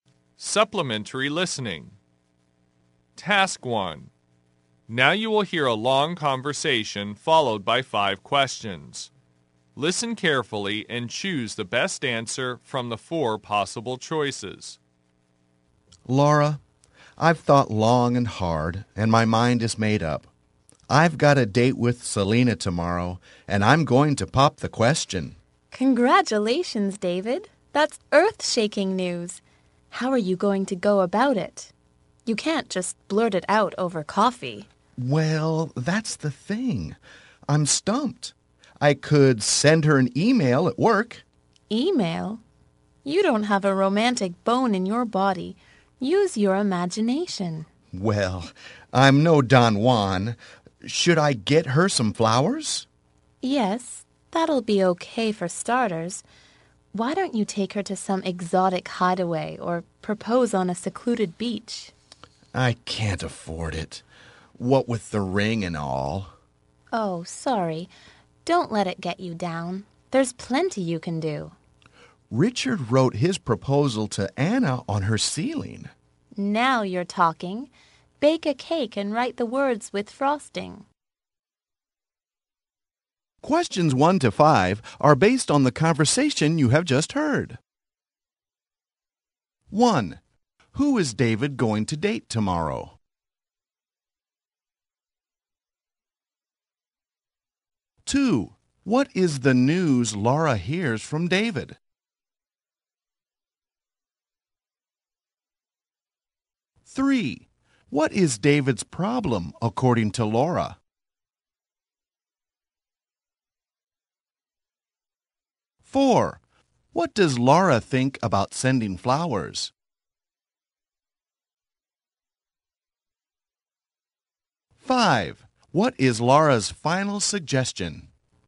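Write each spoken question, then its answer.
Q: Who is David going to date tomorrow?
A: Selena

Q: what is the news Laura hears from David?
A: He is going to propose to Selena

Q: what does Laura think about sending flowers?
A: Okay for starters

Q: what is Laura's final suggestion?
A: Bake a cake and write the proposal in frosting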